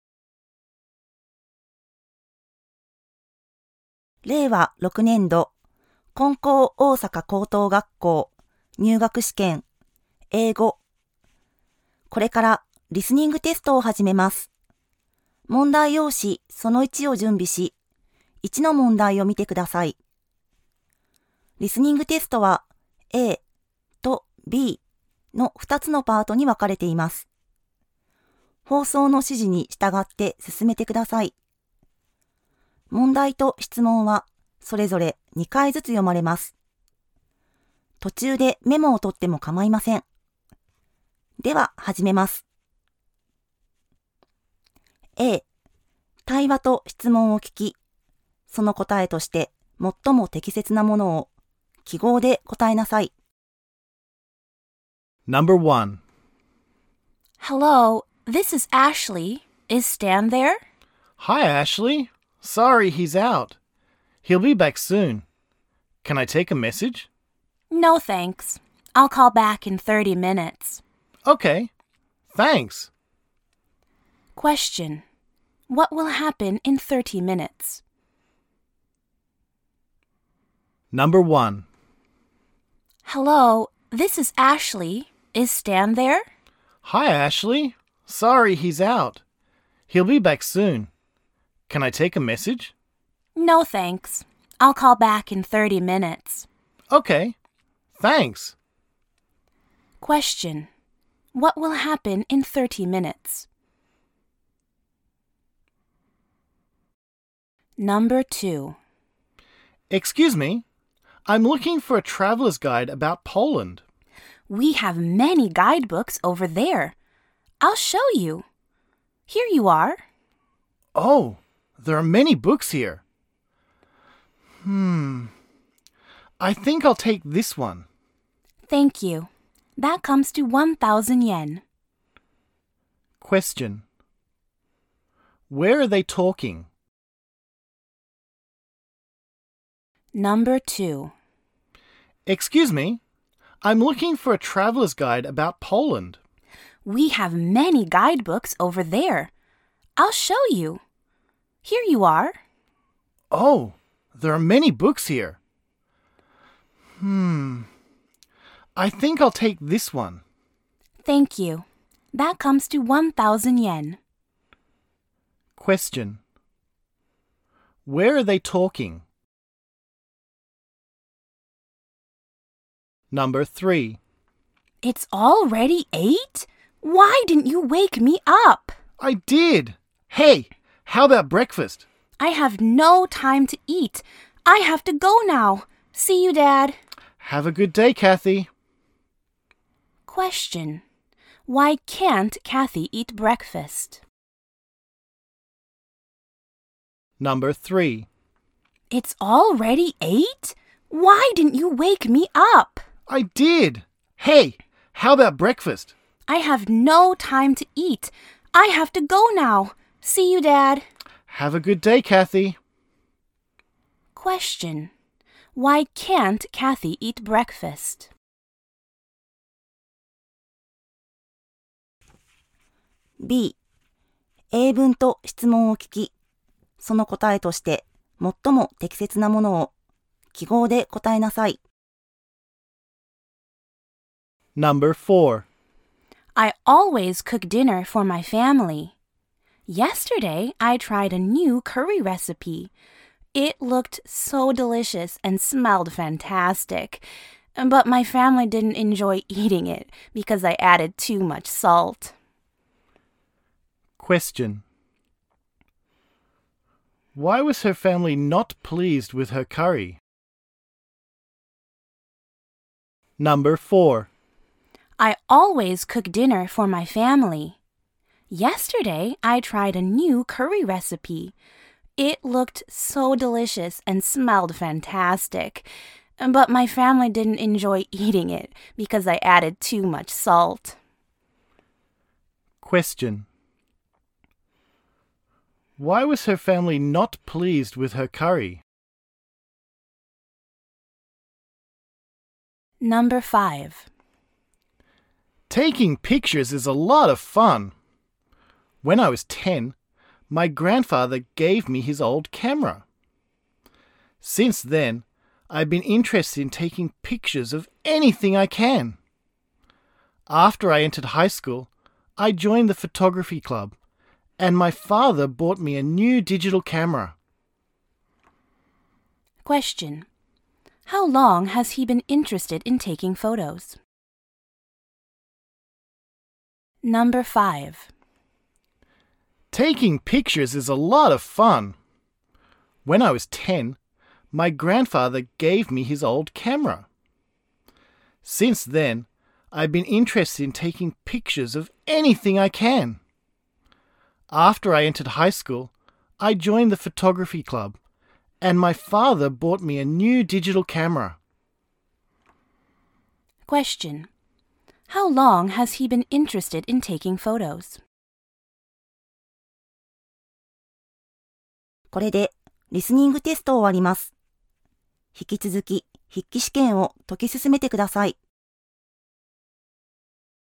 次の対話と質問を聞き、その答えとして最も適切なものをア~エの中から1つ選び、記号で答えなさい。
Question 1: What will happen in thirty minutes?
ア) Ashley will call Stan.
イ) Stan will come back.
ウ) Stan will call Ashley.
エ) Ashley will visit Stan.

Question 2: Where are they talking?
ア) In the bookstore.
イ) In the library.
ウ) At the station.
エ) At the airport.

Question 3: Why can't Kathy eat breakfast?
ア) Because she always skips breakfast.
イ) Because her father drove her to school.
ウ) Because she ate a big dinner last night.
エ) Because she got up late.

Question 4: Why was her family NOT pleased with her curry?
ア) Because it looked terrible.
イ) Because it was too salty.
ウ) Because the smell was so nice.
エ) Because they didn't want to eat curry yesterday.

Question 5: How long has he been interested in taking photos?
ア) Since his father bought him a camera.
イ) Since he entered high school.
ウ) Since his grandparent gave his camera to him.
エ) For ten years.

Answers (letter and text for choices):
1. ア) Ashley will call Stan.
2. ア) In the bookstore.
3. エ) Because she got up late.
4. イ) Because it was too salty.
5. ウ) Since his grandparent gave his camera to him.

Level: 高校